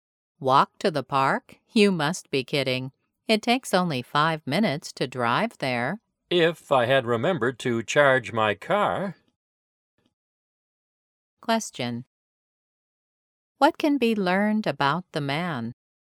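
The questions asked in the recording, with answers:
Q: What can be learned about the man?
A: His car isn't charged, so he can't drive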